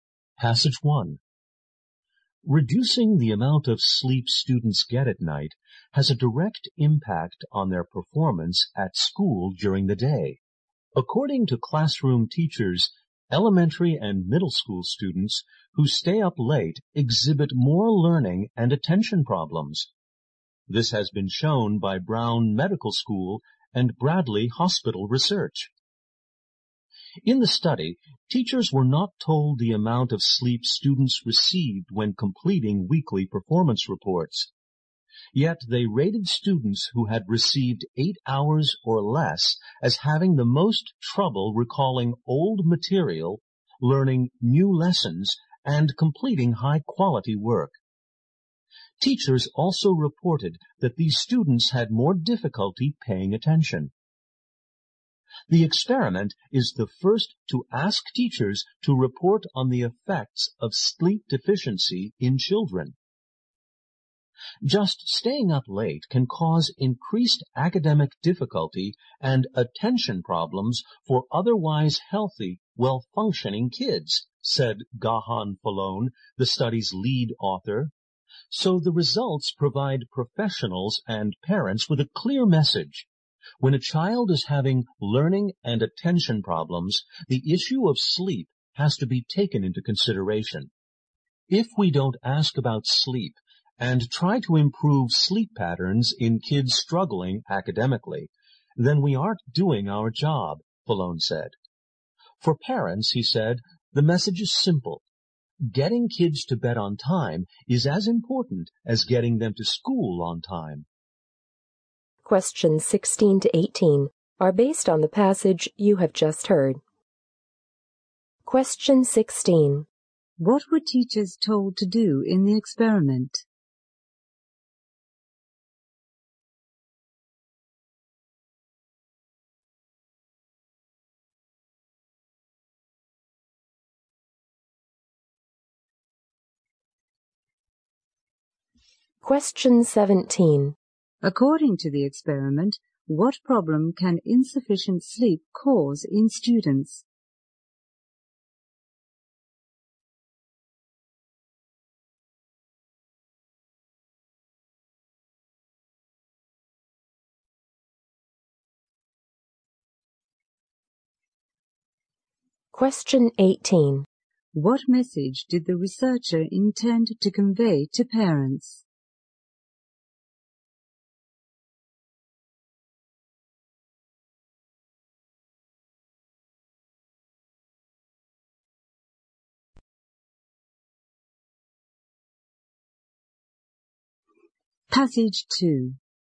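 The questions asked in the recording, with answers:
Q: What were teachers told to do in the experiment?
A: Complete weekly performance reports on students

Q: According to the experiment, what problem can insufficient sleep cause in students?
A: Learning and attention problems

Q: What message did the researcher intend to convey to parents?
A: Getting kids to bed on time is as important as getting them to school on time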